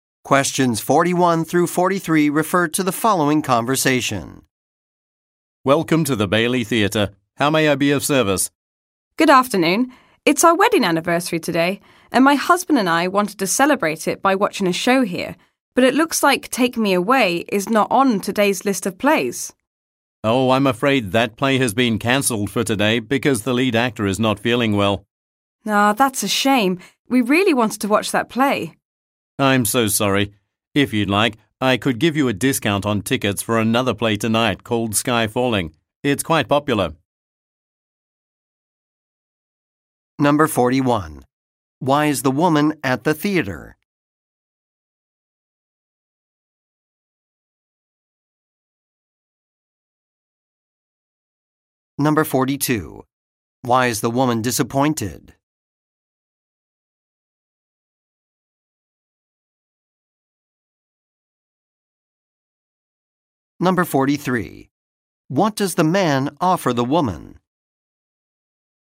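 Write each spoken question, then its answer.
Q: Why is the woman at the theatre?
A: To celebrate her wedding anniversary by watching a show

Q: Why is the woman disappointed?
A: The play she wanted to see, Take Me Away, was cancelled

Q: What does the man offer the woman?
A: A discount on tickets for another play, Sky Falling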